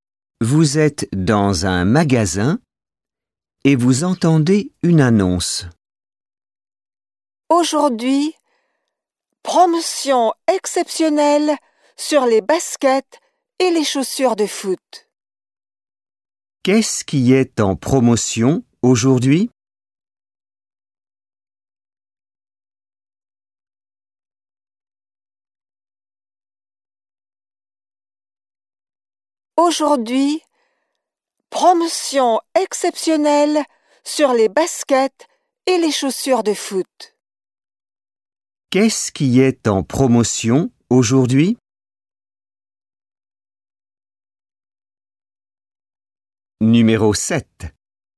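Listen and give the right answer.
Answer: Les baskets et les chaussures de foot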